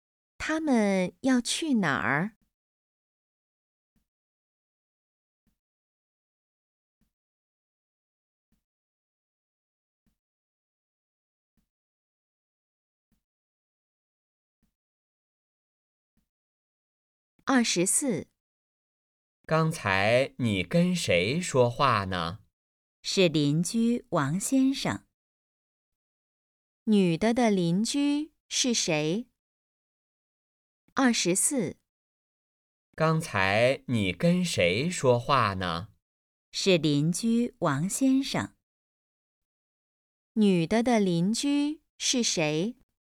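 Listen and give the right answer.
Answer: 王先生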